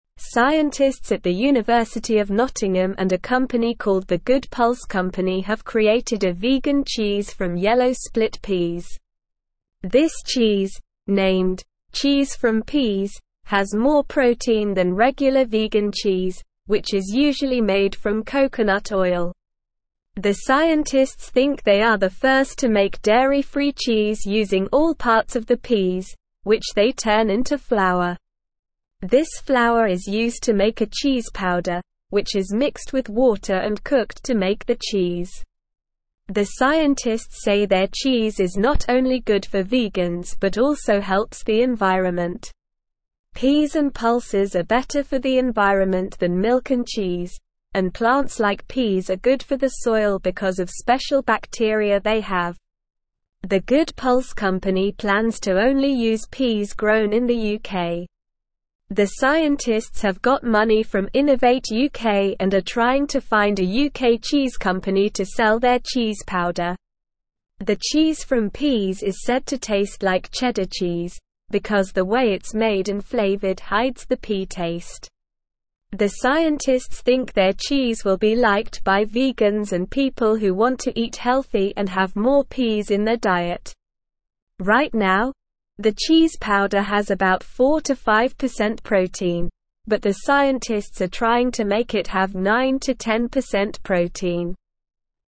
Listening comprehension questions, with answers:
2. This cheese, named "Cheese from Peas," has more protein than (2)______ vegan cheese, which is usually made from coconut oil.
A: regular

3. The scientists think they are the (3)______ to make dairy-free (4)______ (5)______ all parts of the peas, which they turn into (6)______.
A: first

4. The scientists think they are the (3)______ to make dairy-free (4)______ (5)______ all parts of the peas, which they turn into (6)______.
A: cheese

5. The scientists think they are the (3)______ to make dairy-free (4)______ (5)______ all parts of the peas, which they turn into (6)______.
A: using

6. The scientists think they are the (3)______ to make dairy-free (4)______ (5)______ all parts of the peas, which they turn into (6)______.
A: flour

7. Peas and pulses are better for the environment than milk and cheese, and plants like peas are good for the soil because of special (7)______ they have.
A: bacteria

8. The scientists have got (8)______ from Innovate UK and are (9)______ to find a UK cheese company to sell their cheese powder.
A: money

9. The scientists have got (8)______ from Innovate UK and are (9)______ to find a UK cheese company to sell their cheese powder.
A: trying

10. The Cheese from Peas is said to taste like cheddar cheese, because the way it's made and flavored (10)______ the pea taste.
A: hides

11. The scientists think their cheese will be (11)______ by vegans and people who want to eat healthy and have more peas in their diet.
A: liked

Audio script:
Scientists at the University of Nottingham and a company called The Good Pulse Company have created a vegan cheese from yellow split peas. This cheese, named "Cheese from Peas," has more protein than regular vegan cheese, which is usually made from coconut oil. The scientists think they are the first to make dairy-free cheese using all parts of the peas, which they turn into flour. This flour is used to make a cheese powder, which is mixed with water and cooked to make the cheese.
The scientists say their cheese is not only good for vegans but also helps the environment. Peas and pulses are better for the environment than milk and cheese, and plants like peas are good for the soil because of special bacteria they have. The Good Pulse Company plans to only use peas grown in the UK. The scientists have got money from Innovate UK and are trying to find a UK cheese company to sell their cheese powder.
The Cheese from Peas is said to taste like cheddar cheese, because the way it's made and flavored hides the pea taste. The scientists think their cheese will be liked by vegans and people who want to eat healthy and have more peas in their diet. Right now, the cheese powder has about 4-5% protein, but the scientists are trying to make it have 9-10% protein.

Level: Level 2